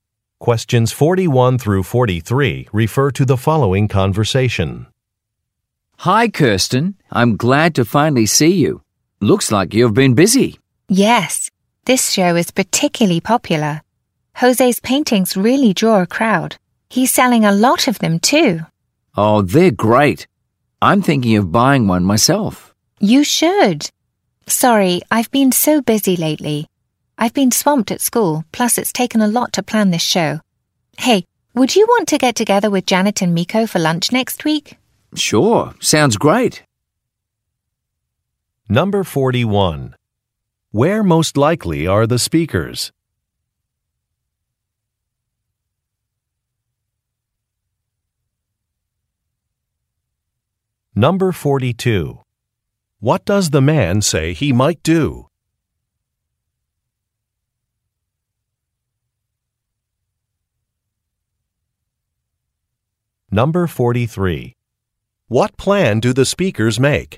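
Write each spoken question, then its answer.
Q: Where most likely are the speakers?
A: At an art gallery (a painting exhibition)

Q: What does the man say he might do?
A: Buy one of Jose's paintings

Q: What plan do the speakers make?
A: To have lunch with Janet and Miko next week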